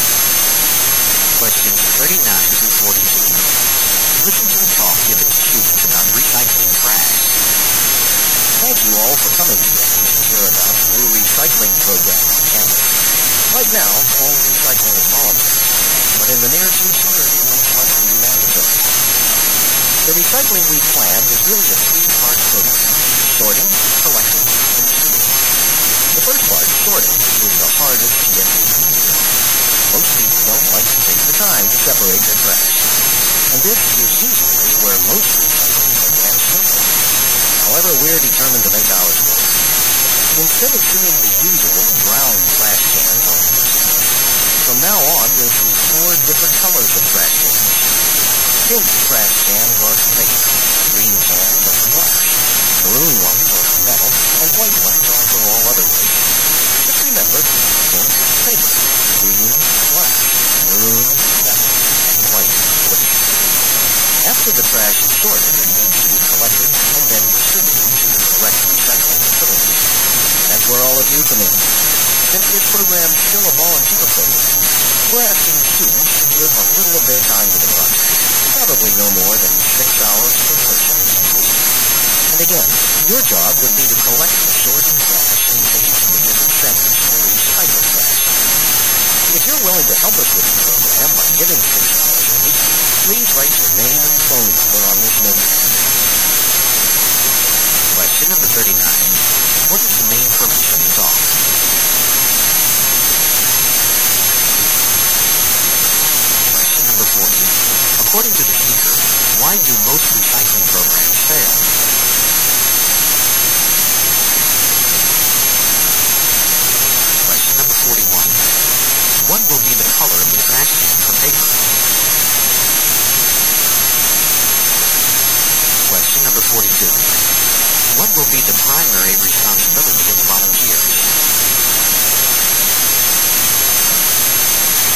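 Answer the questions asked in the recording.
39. To recruit volunteers for the campus recycling program
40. People don't take the time to sort their trash
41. Pink
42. Collecting the sorted trash and taking it to recycling centers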